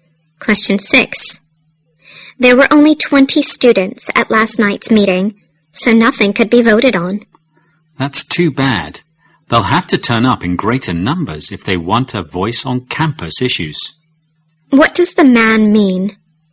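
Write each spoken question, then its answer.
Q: What does the man mean?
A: More students must come to meetings if they want a say on campus issues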